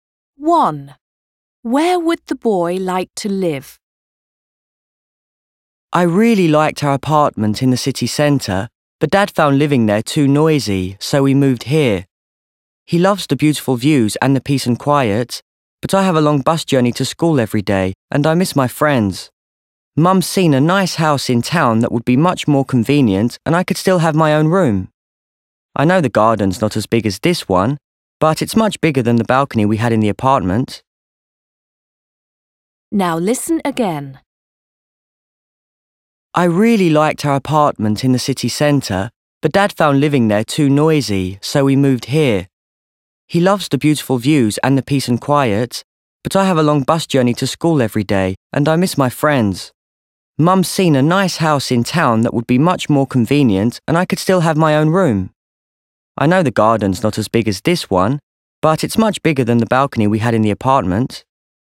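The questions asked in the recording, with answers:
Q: Where would the boy like to live?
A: In a house in town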